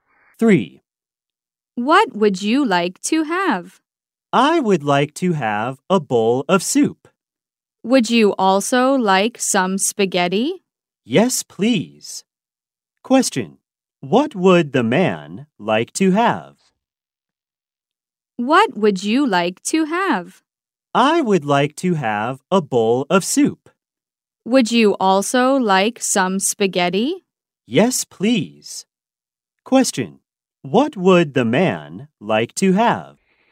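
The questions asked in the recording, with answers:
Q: What would the man like to have?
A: A bowl of soup and some spaghetti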